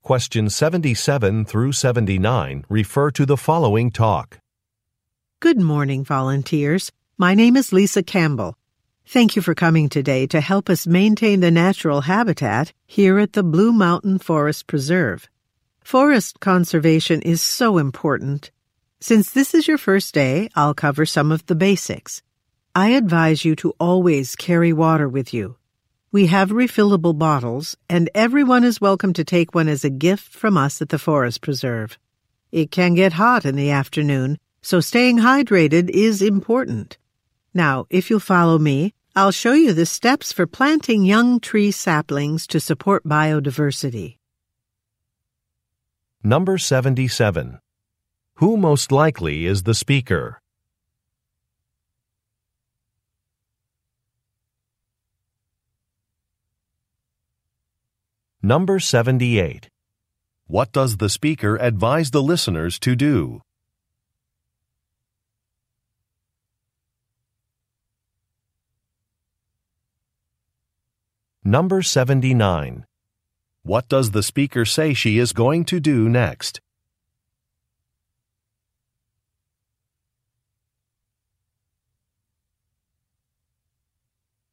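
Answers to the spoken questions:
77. A forest preserve staff member who leads volunteers
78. Always carry water with them
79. Show the steps for planting young tree saplings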